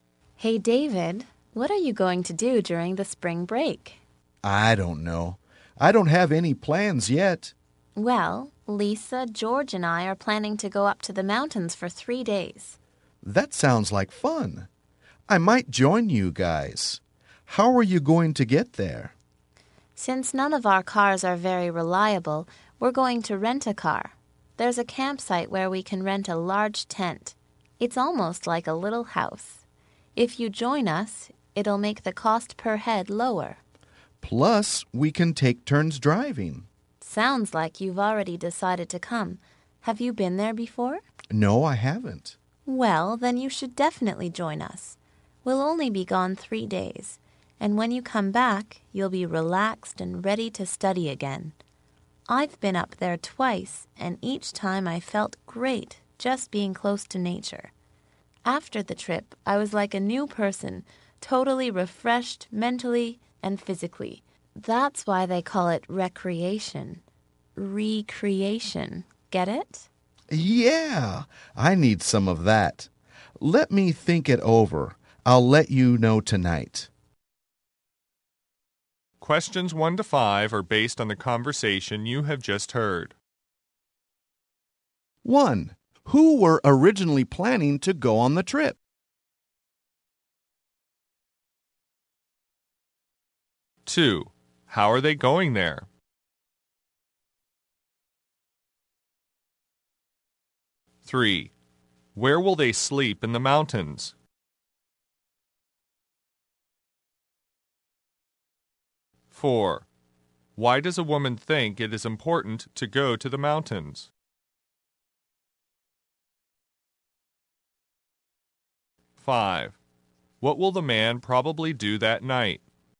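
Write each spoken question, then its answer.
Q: Who were originally planning to go on the trip?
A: Lisa, George and the woman.

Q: How are they going there?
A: By rented car.

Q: Where will they sleep in the mountains?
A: In a large rented tent at a campsite.

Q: Why does a woman think it is important to go to the mountains?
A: To relax and be refreshed by nature.

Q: What will the man probably do that night?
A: Tell them his decision.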